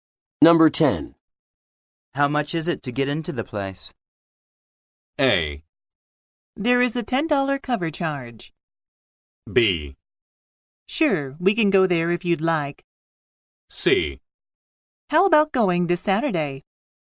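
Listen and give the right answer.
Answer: A: There is a $10 cover charge.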